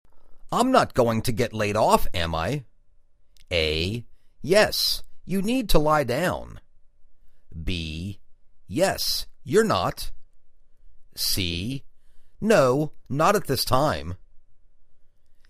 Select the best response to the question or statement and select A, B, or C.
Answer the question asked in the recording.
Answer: No, not at this time.